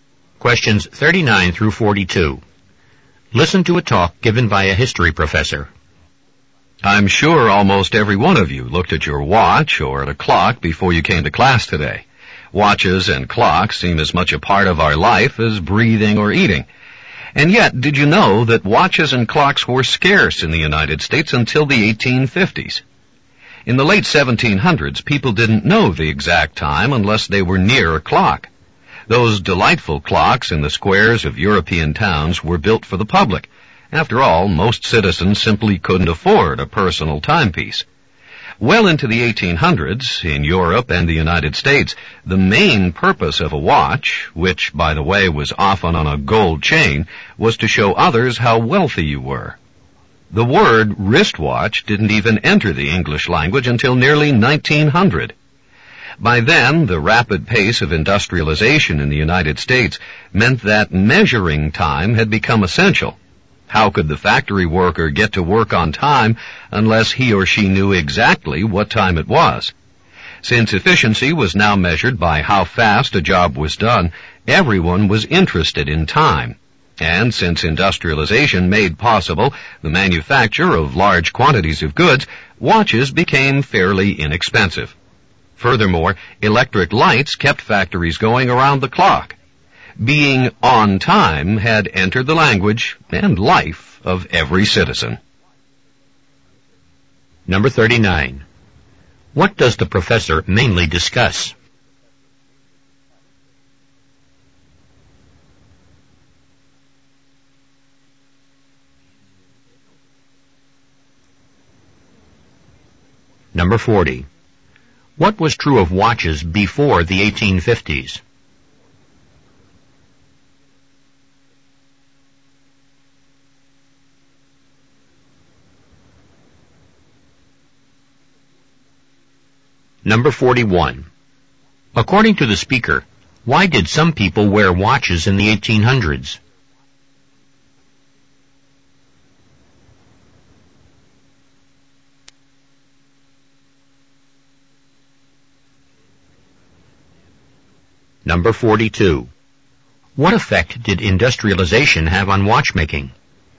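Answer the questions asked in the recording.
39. How watches and clocks became common in the United States
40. They were scarce
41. To show others how wealthy they were
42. Watches could be made in large quantities and became fairly inexpensive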